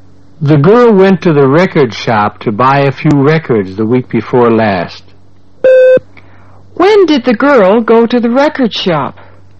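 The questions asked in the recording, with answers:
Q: When did the girl go to the record shop?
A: The week before last.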